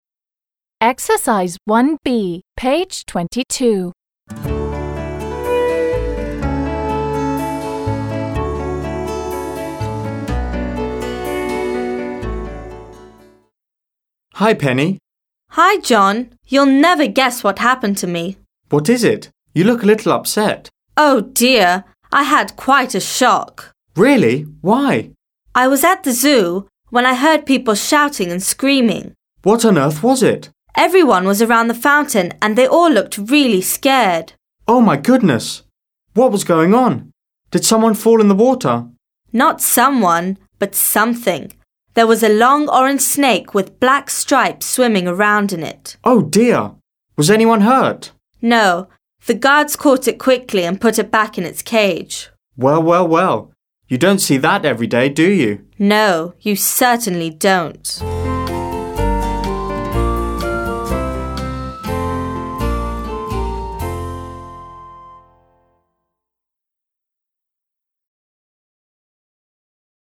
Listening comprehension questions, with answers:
1. b) Предложения в упражнении 1а взяты из диалога между двумя друзьями. Прочитайте первые два предложения и посмотрите на картинку. Как вы думаете, что случилось с Пенни? Послушайте и проверьте.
Как вы думаете, что случилось с Пенни?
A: Penny saw a snake in the fountain.

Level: 7 класс